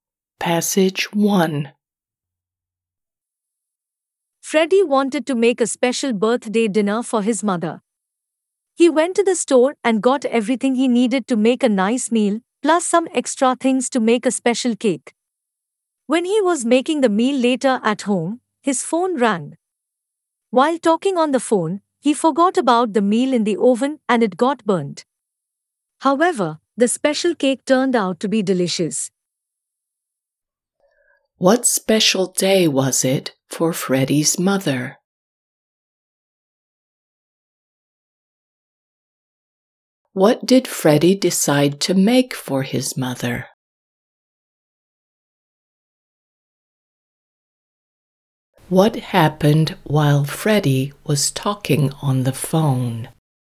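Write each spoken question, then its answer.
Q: What special day was it for Freddie's mother?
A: her birthday

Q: What did Freddie decide to make for his mother?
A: a special birthday dinner

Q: What happened while Freddie was talking on the phone?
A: the meal got burnt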